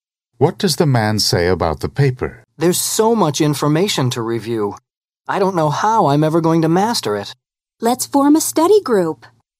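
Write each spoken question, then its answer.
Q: What does the woman mean?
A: They should study together in a group.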